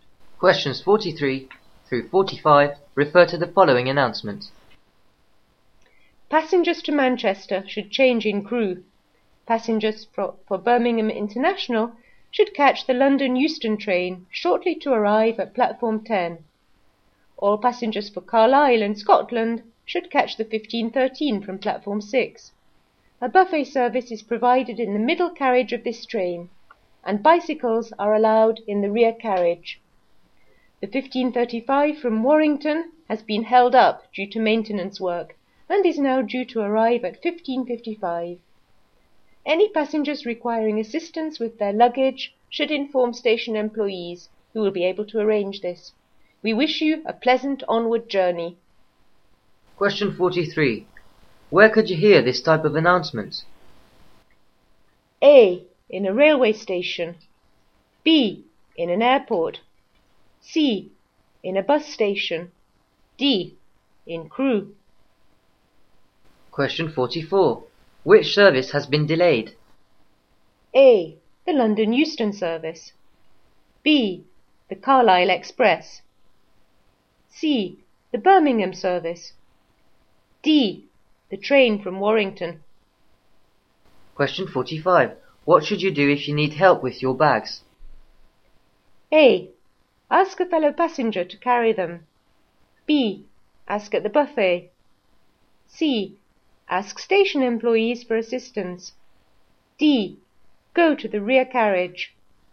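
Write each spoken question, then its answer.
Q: Where could you hear this type of announcement?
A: A: In a railway station.

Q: Which service has been delayed?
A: D: The train from Warrington.

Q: What should you do if you need help with your bags?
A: C: Ask station employees for assistance.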